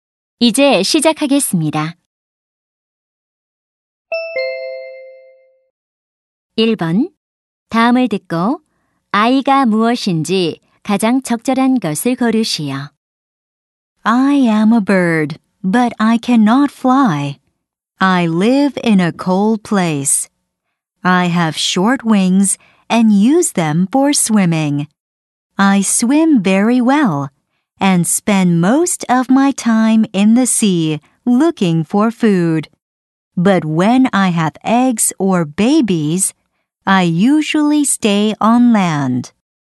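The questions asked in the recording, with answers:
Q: 다음을 듣고 아이가 무엇인지 가장 적절한 것을 고르시오.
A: 펭귄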